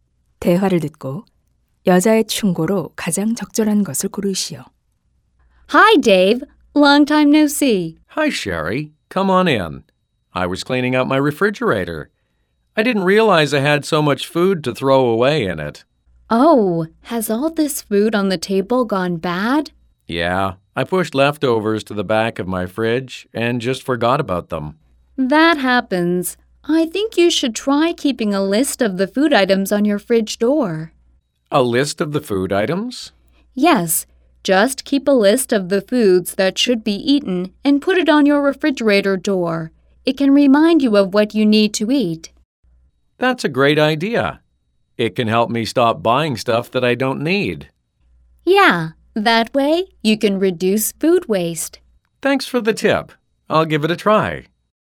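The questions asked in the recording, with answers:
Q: 대화를 듣고 여자의 충고로 가장 적절한 것을 고르시오.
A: 냉장고 문에 먹어야 할 음식 목록을 붙여 두어라.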